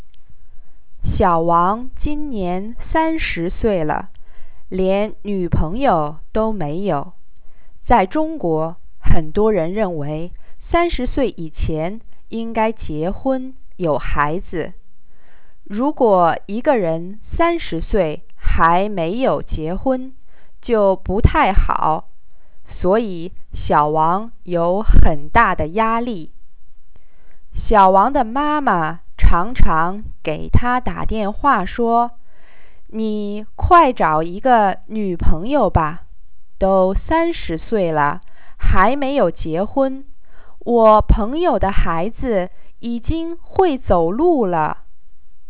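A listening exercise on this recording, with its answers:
Please listen to the passage and answer the following questions in English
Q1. Why does Xiaowang have pressure?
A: He is 30 and not married, and in China many people think you should marry and have children before 30.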